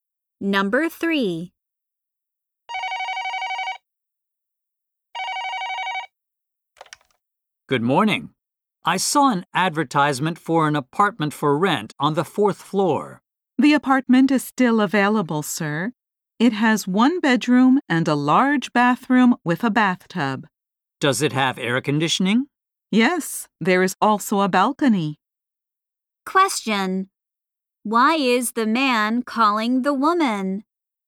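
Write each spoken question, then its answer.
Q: Why is the man calling the woman?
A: To ask about an apartment for rent.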